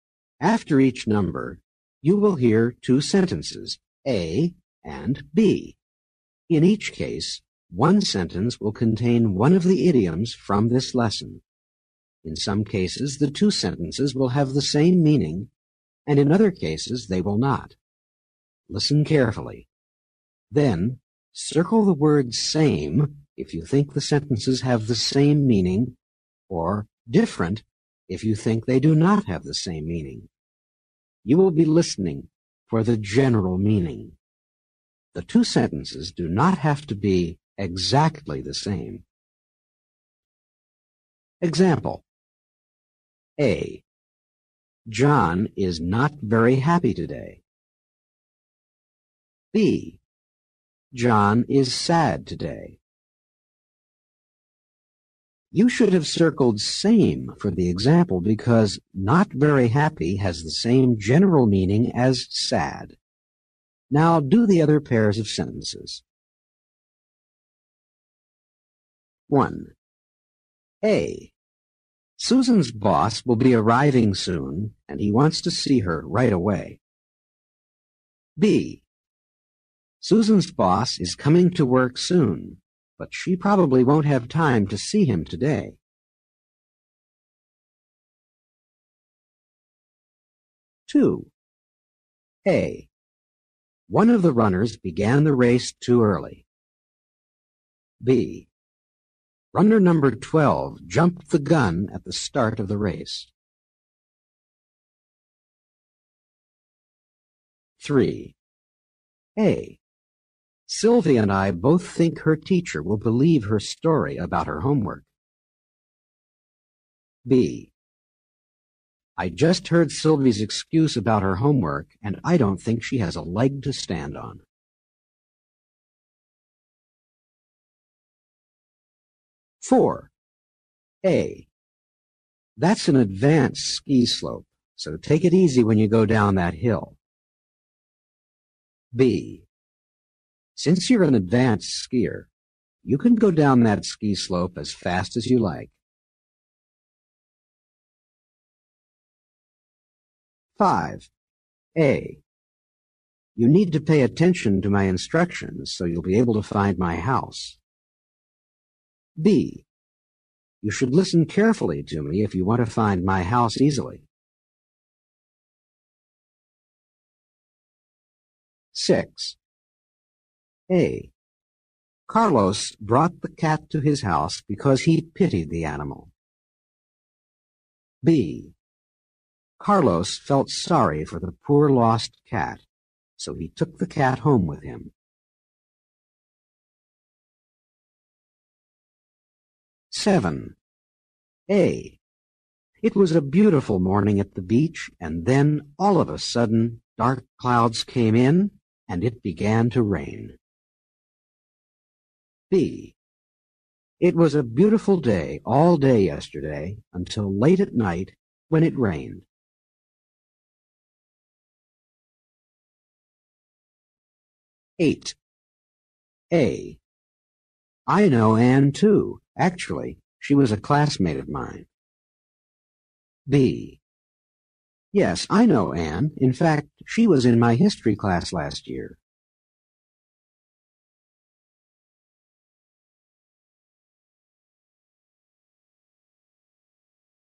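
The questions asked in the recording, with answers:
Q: 1. A. Susan's boss will be arriving soon, and he wants to see her right away. B. Susan's boss is coming to work soon, but she probably won't have time to see him today.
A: different

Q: Two. A. One of the runners began the race too early. B. Runner number 12 jumped the gun at the start of the race.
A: same

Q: 3. A. Sylvie and I both think her teacher will believe her story about her homework. B. I just heard Sylvie's excuse about her homework, and I don't think she has a leg to stand on.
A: different

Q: 4. A. That's an advanced ski slope, so take it easy when you go down that hill. B. Since you're an advanced skier, you can go down that ski slope as fast as you like.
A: different

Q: 5. A. You need to pay attention to my instructions so you'll be able to find my house. B. You should listen carefully to me if you want to find my house easily.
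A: same

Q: 6. A. Carlos brought the cat to his house because he pitied the animal. B. Carlos felt sorry for the poor lost cat, so he took the cat home with him.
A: same

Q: 7. A. It was a beautiful morning at the beach, and then, all of a sudden, dark clouds came in, and it began to rain. B. It was a beautiful day all day yesterday, until late at night, when it rained.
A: different

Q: 8. A. I know Anne, too, actually. She was a classmate of mine. B. Yes, I know Anne. In fact, she was in my history class last year.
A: same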